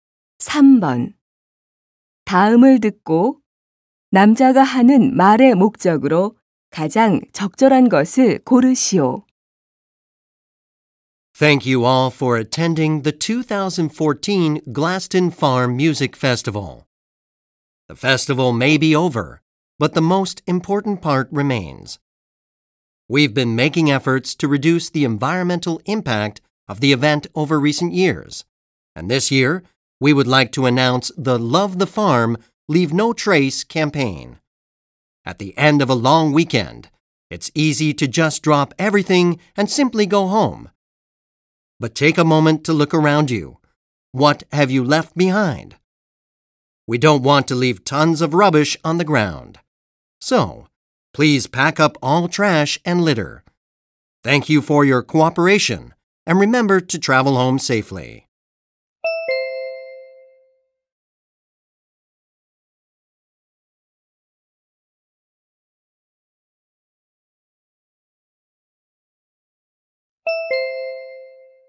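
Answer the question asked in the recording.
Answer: 축제 후 쓰레기를 모두 챙겨 가도록 요청하려고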